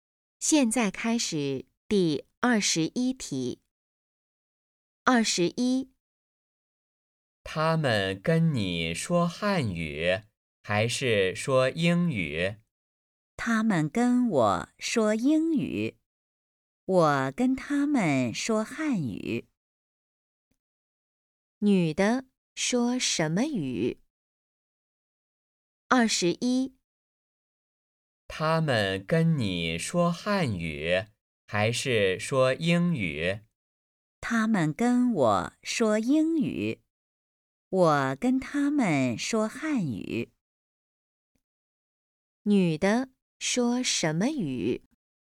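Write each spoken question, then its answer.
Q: 女的说什么语?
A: 汉语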